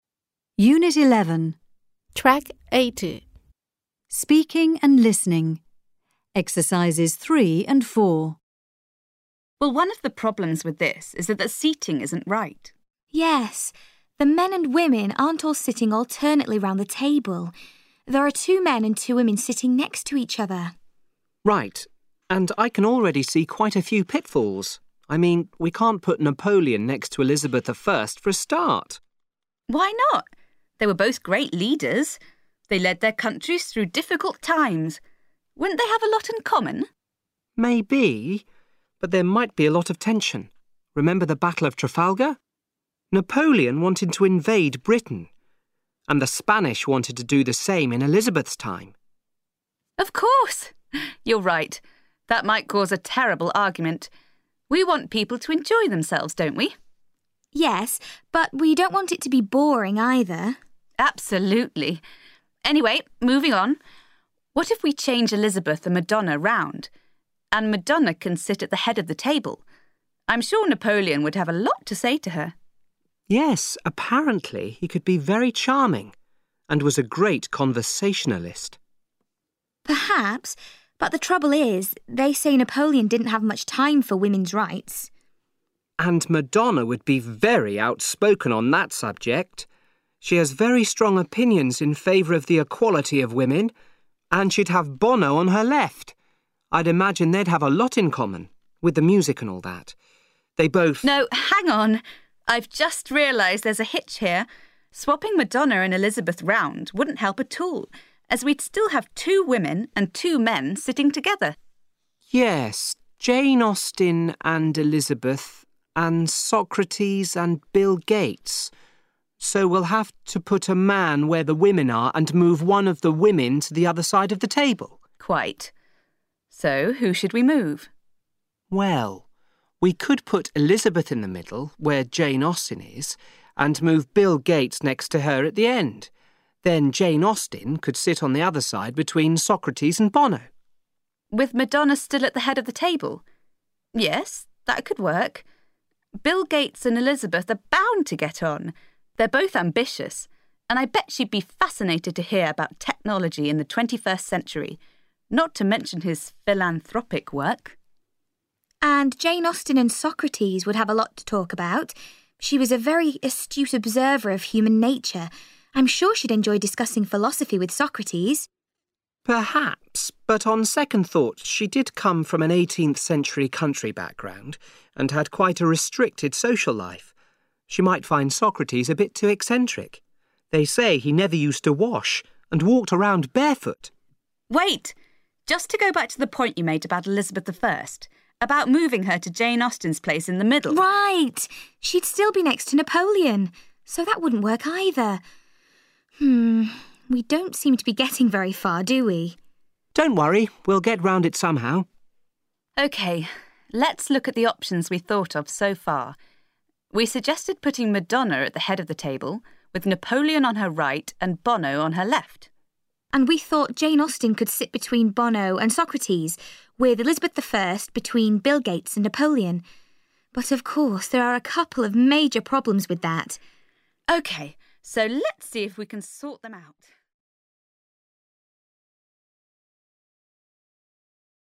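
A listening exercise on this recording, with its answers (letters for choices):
Listen to three people discussing the seating plan. Complete Speak Out with by drag-and-dropping words from the box. Then listen again and check.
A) pitfalls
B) hitch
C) point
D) far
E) Moving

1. I can already see quite a few 1 1 .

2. I've just realised there's a 2 2 here.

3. Just to go back to the 3 3 you made about ...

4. We don't seem to be getting very 4 4 , do we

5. Let's move on, shall we/5 5 on ...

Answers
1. A
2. B
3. C
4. D
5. E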